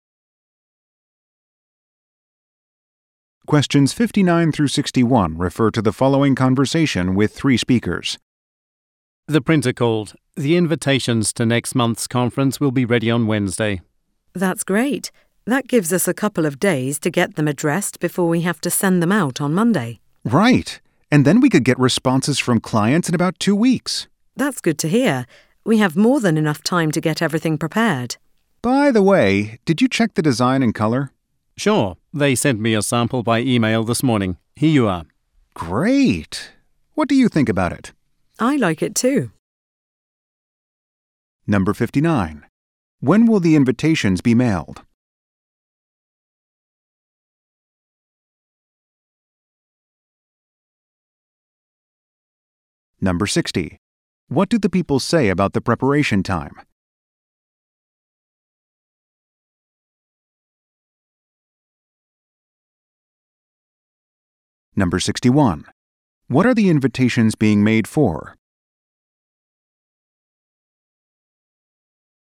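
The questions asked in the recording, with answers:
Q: When will the invitations be mailed?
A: On Monday

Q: What do the people say about the preparation time?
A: There is more than enough time

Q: What are the invitations being made for?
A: Next month's conference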